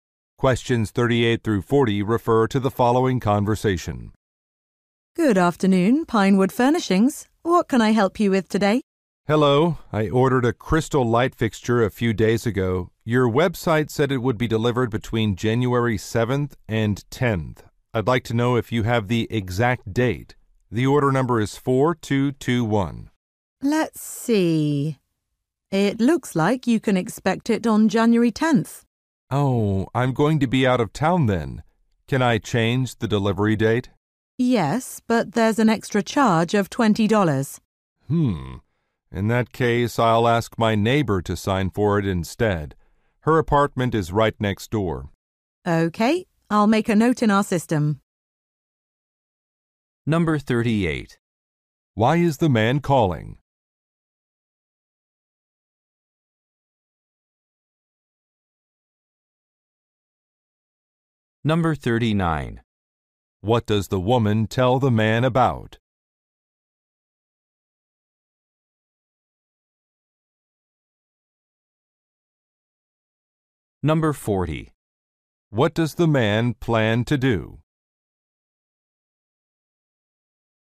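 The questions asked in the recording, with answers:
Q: Why is the man calling?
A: To find out the exact delivery date of his order

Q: What does the man plan to do?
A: Ask his neighbor to sign for the delivery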